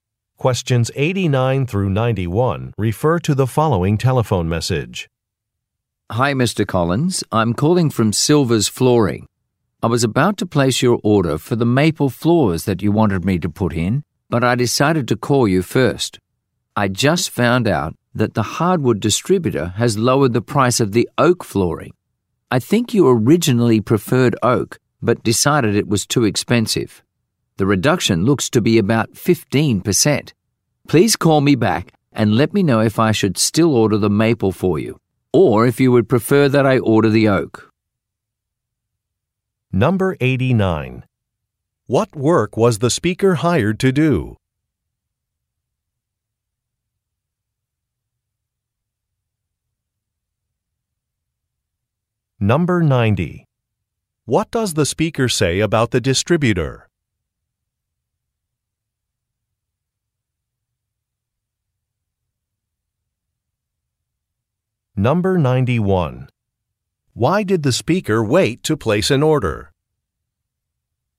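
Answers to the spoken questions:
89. Install floors
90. It lowered the price of oak flooring
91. The customer might prefer the oak now that it's cheaper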